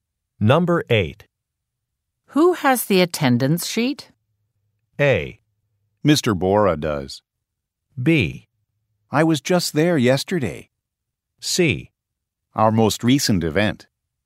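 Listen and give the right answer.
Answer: A: Mr. Bora does.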